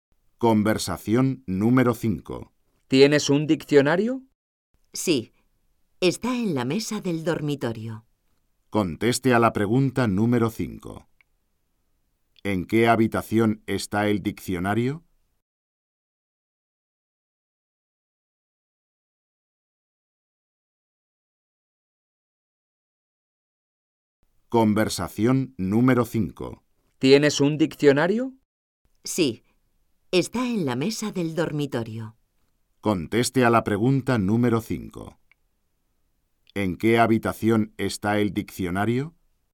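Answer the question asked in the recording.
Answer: En el dormitorio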